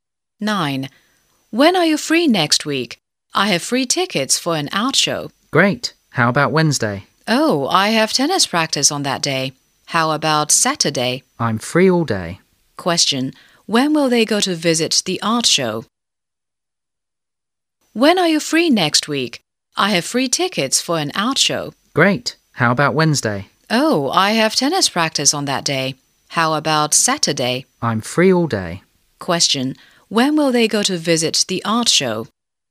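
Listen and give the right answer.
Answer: On Saturday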